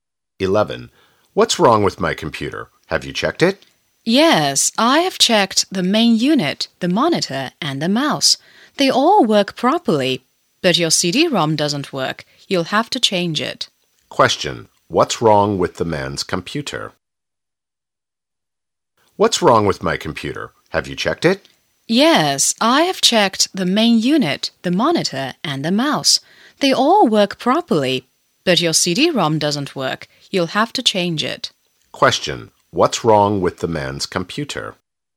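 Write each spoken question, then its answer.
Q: What's wrong with the man's computer?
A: The CD-ROM doesn't work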